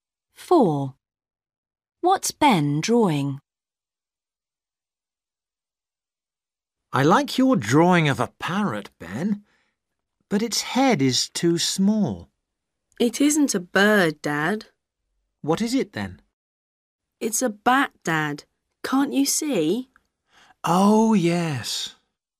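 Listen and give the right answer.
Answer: a bat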